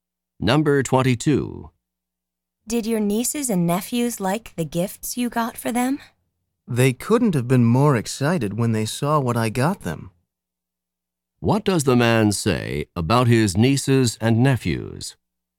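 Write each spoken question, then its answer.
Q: What does the man say about his nieces and nephews?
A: They were extremely excited about the gifts.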